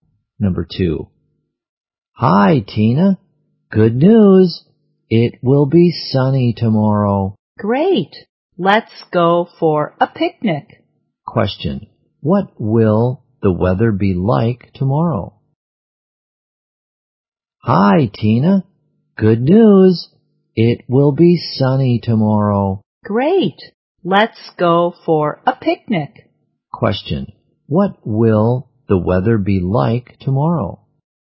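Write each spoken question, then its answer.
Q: What will the weather be like tomorrow?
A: Sunny.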